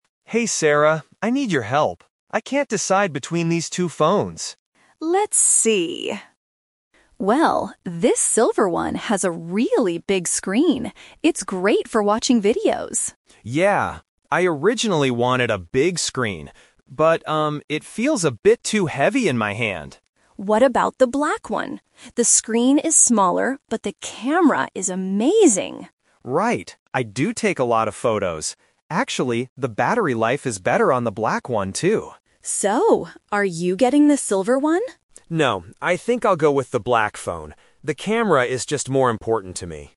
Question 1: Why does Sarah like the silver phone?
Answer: It is good for watching videos.

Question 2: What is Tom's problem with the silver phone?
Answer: It is too heavy.

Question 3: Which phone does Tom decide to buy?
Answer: The black phone, because of the camera.

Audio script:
Tom: Hey Sarah, I need your help. I can't decide between these two phones.
Sarah: Let's see... Well, this silver one has a really big screen. It's great for watching videos.
Tom: Yeah, I originally wanted a big screen. But, um, it feels a bit too heavy in my hand.
Sarah: What about the black one? The screen is smaller, but the camera is amazing.
Tom: Right. I do take a lot of photos. Actually, the battery life is better on the black one, too.
Sarah: So, are you getting the silver one?